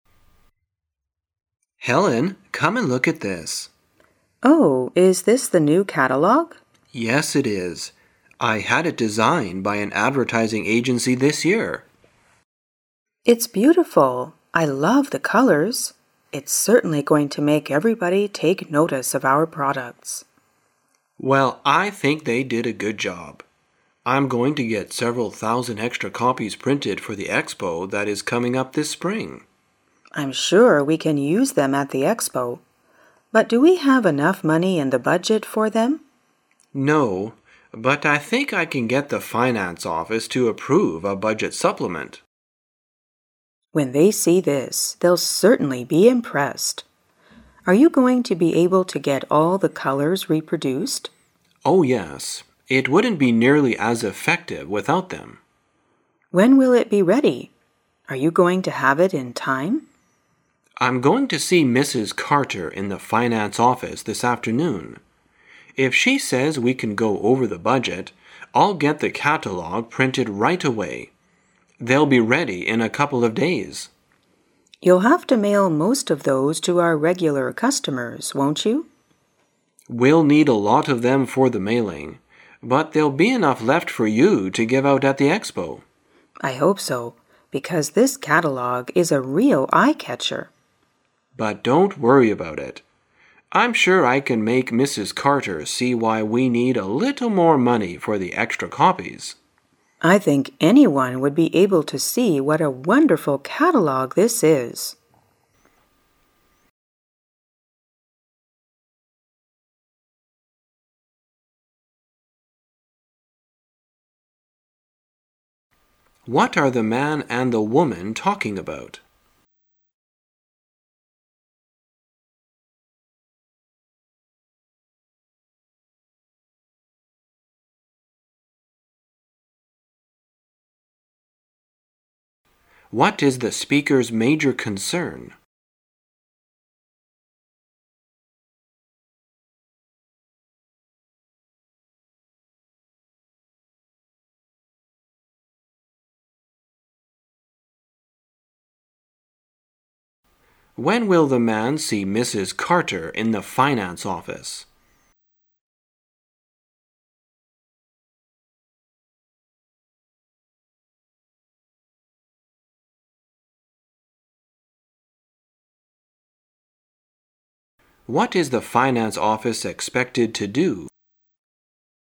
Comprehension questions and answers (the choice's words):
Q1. What is the speakers' major concern?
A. They don't have enough money for extra copies.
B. They don't have time to print the new catalogue.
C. They cannot get in touch with their regular customers.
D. They cannot attend the expo coming up this spring.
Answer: They don't have enough money for extra copies.

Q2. When will the man see Mrs Carter in the finance office?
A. Right away.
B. At noon.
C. In the afternoon.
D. In a couple of days.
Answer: In the afternoon.

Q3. What is the finance office expected to do?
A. To approve a budget supplement.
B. To pay the advertising agency for the expo.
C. To hold Mrs Cater responsible for the catalogue.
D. To design a real eye-catcher.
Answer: To approve a budget supplement.

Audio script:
[解析] 27-30 M: Helen, come and look at this. W: Oh, is this the new catalogue? M: Yes, it is. I had it designed by an advertising agency this year. W: It's beautiful! I love the colors! It's certainly going to make everybody take notice of our products. M: Well, I think they did a good job. I'm going to get several thousand extra copies printed for the Expo that is coming up this spring. W: I'm sure we can use them at the expo, but do we have enough money in the budget for them? M: No, but I think I can get the finance office to approve a budget supplement. W: When they see this, they'll certainly be impressed. Are you going to be able to get all the colors reproduced? M: Oh, yes. It wouldn't be nearly as effective without them. W: When will it be ready? Are you going to have it in time? M: I'm going to see Mrs Carter in the finance office this afternoon. If she says we can go over the budget, I'll get the catalogue printed right away. They'll be ready in a couple of days. W: You'll have to mail most of those to our regular customers, won't you? M: We'll need a lot of them for the mailing, but there'll be enough left for you to give out at the expo. W: I hope so, because this catalogue is a real eye-catcher. M: But don't worry about it. I'm sure I can make Mrs Carter see why we need a little more money for the extra copies. W: I think anyone would be able to see what a wonderful catalogue this is! What are the man and the woman talking about?